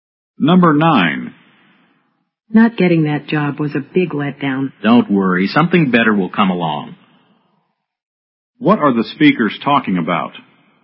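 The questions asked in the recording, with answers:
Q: What are the speakers talking about?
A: A disappointing job rejection.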